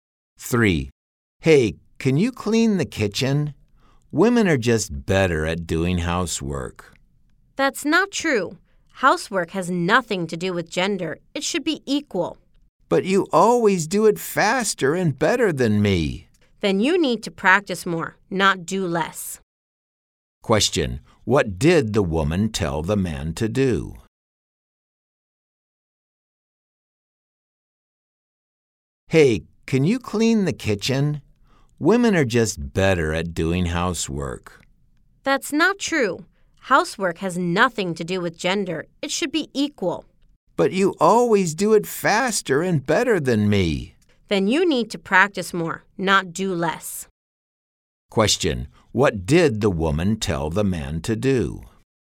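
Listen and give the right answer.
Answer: Practice doing housework more.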